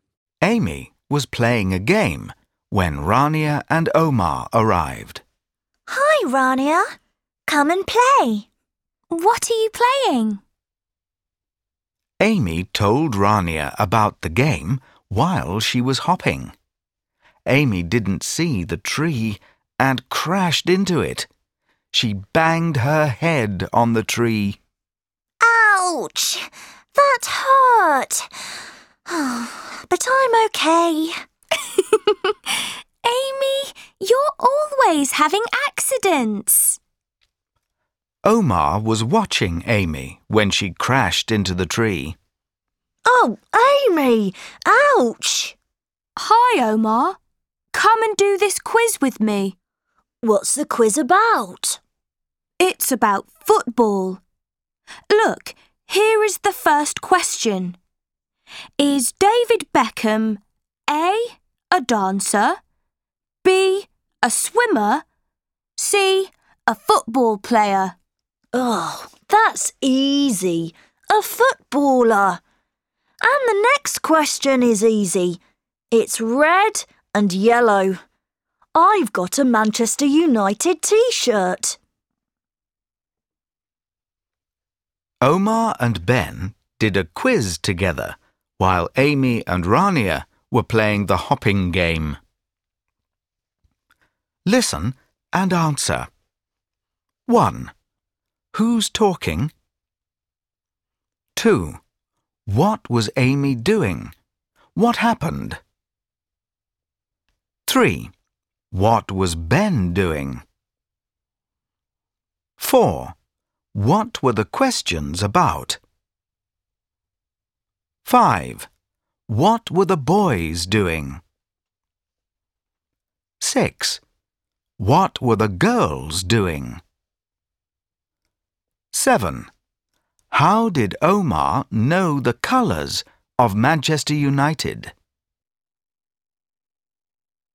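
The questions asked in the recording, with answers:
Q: What was Amy doing? What happened?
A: She was playing a hopping game; she crashed into a tree and banged her head.

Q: What was Ben doing?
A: He was doing a football quiz.

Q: What were the questions about?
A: Football

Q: What were the boys doing?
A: Doing a quiz together

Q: What were the girls doing?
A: Playing the hopping game

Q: How did Omar know the colours of Manchester United?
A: He has a Manchester United T-shirt.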